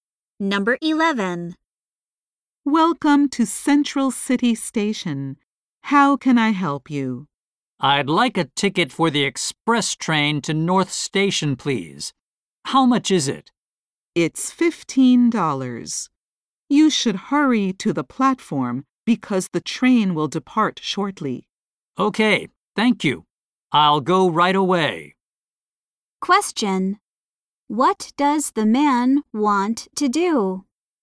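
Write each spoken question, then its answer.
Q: What does the man want to do?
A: Buy a ticket for the express train to North Station.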